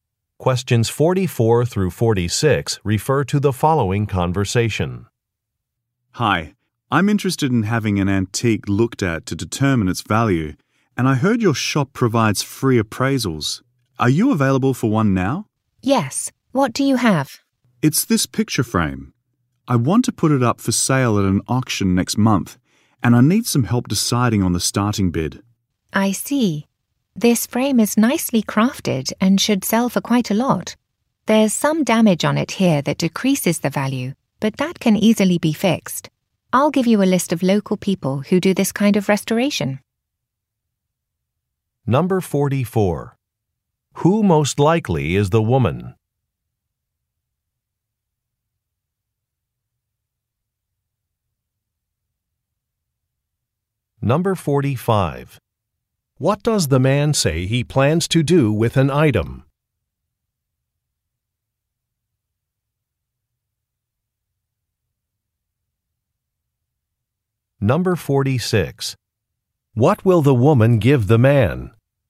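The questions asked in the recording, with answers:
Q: Who most likely is the woman?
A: An antique appraiser at a shop

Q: What does the man say he plans to do with an item?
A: Sell it at an auction

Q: What will the woman give the man?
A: A list of local restoration people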